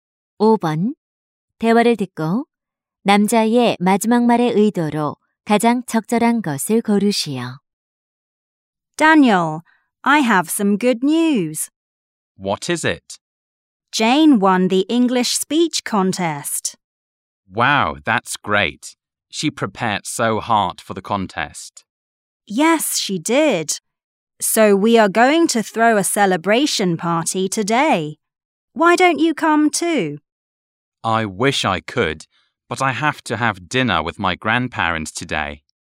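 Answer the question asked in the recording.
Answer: 파티 초대를 거절하기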